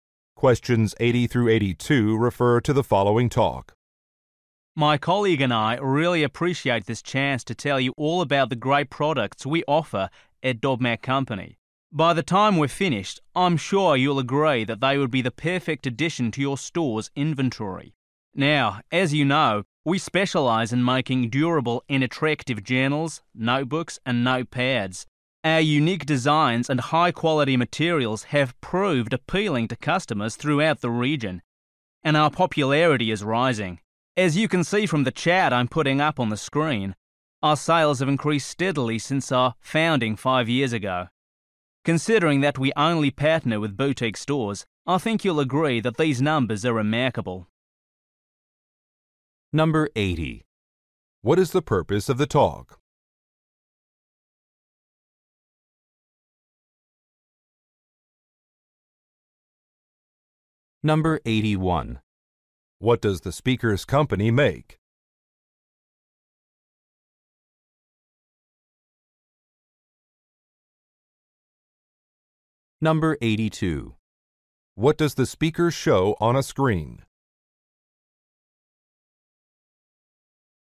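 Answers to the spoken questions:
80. To get the listeners' store to stock the company's products
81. Journals, notebooks, and notepads
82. A chart of the company's sales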